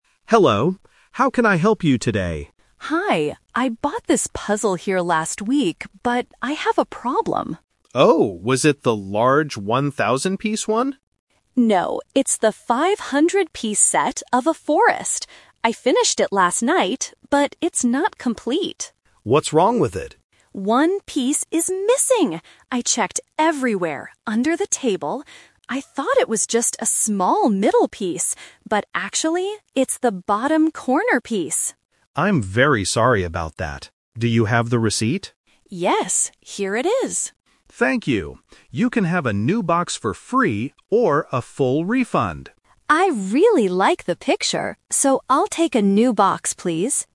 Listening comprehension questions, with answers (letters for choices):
Listen to a conversation between a customer and a shop assistant. Choose the correct answer (A, B, or C).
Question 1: How many pieces does the puzzle have?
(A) 100 pieces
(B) 500 pieces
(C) 1,000 pieces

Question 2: Which piece is missing from the puzzle?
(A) A piece of the forest.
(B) A middle piece.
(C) A corner piece.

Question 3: What does the customer decide to do?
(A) Get a full refund.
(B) Get a new puzzle box.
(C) Buy a different picture.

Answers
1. B
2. C
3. B

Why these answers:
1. The customer corrects the staff: "No, it's the 500-piece set..."
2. The customer confirms the exact missing part: "...but actually, it's the bottom corner piece."
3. After the staff offers two choices, the customer says: "I'll take a new box, please."

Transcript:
Staff: Hello! How can I help you today?
Customer: Hi. I bought this puzzle here last week, but I have a problem.
Staff: Oh, was it the large 1,000-piece one?
Customer: No, it's the 500-piece set of a forest. I finished it last night, but it's not complete.
Staff: What's wrong with it?
Customer: One piece is missing! I checked everywhere under the table. I thought it was just a small middle piece, but actually, it's the bottom corner piece.
Staff: I'm very sorry about that. Do you have the receipt?
Customer: Yes, here it is.
Staff: Thank you. You can have a new box for free or a full refund.